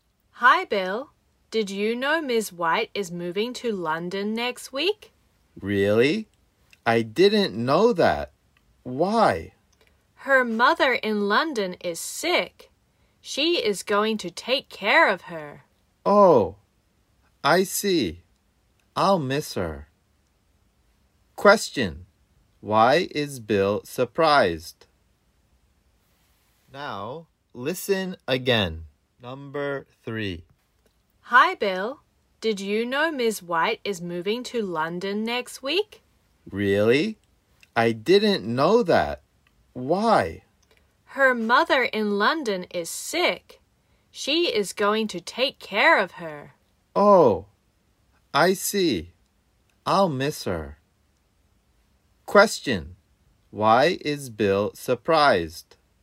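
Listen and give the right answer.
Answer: Because Ms. White is moving to London next week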